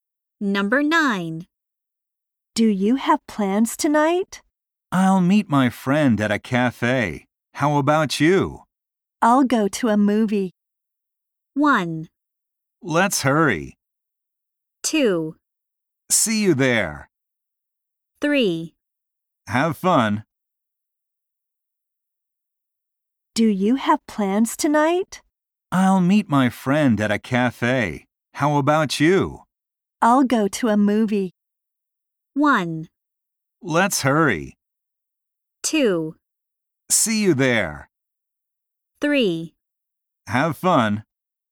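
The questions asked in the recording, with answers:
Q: I'll go to a movie.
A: 3: Have fun.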